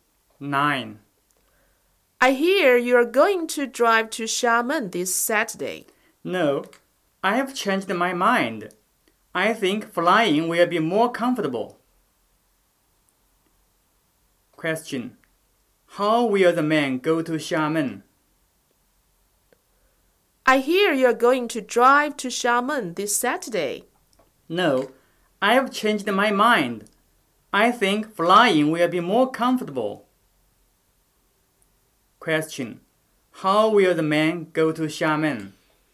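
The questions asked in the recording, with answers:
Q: How will the man go to Xiamen?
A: By plane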